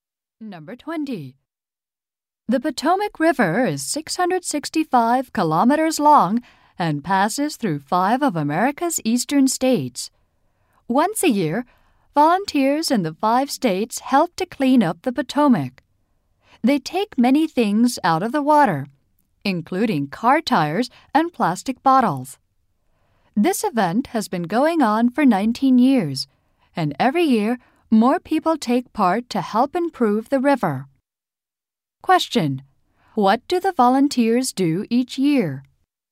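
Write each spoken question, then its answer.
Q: What do the volunteers do each year?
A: Clean up the Potomac River.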